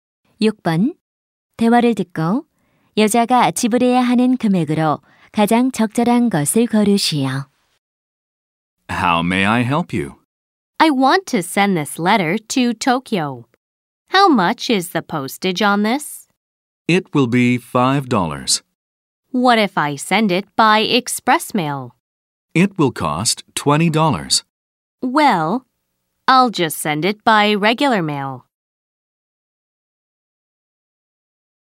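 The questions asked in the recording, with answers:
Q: 대화를 듣고 여자가 지불해야 하는 금액으로 가장 적절한 것을 고르시오.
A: 5달러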